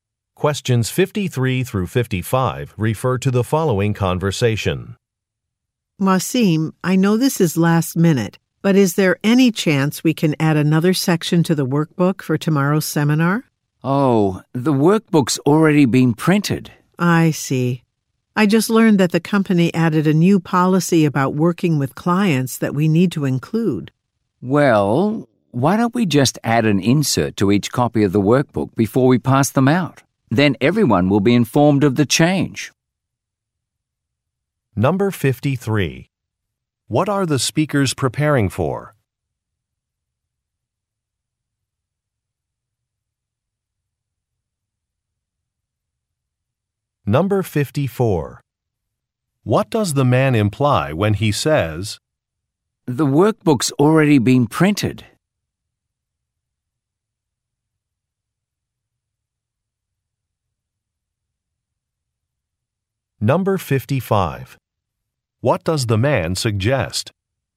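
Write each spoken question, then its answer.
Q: What are the speakers preparing for?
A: A seminar

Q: What does the man imply when he says,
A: It is too late to add a section

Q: What does the man suggest?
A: Adding an insert to each workbook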